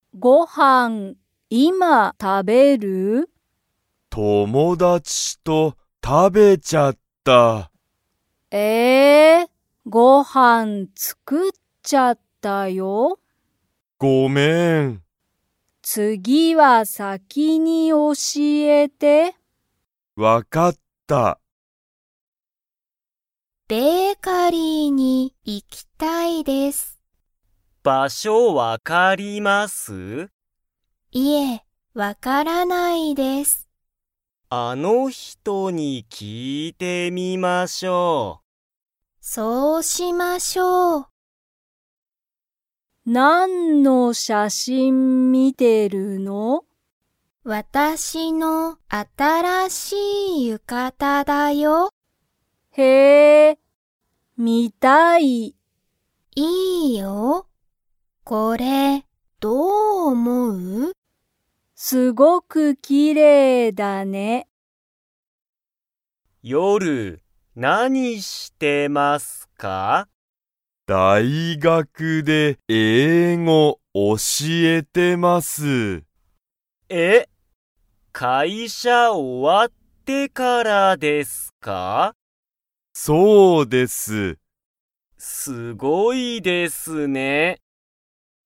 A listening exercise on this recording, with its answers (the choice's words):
Comprehension Quiz (Skip if you don't understand the conversation yet)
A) はい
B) いいえ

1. ケンイチは、今(いま)ごはんを食(た)べますか?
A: いいえ

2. 森本(もりもと)さんは、ベーカリーの場所(ばしょ)が分(わ)かりますか?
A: いいえ

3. アスカは、ミサコの浴衣(ゆかた)が____と思(おも)う。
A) 少(すこ)し新(あたら)しい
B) かわいくない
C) なんかすごい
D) すごくきれいだ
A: すごくきれいだ

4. 中山(なかやま)さんは、大学(だいがく)で____を教(おし)えている。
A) 夜(よる)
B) 英語(えいご)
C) 会社(かいしゃ)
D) 写真(しゃしん)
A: 英語(えいご)

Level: Level 1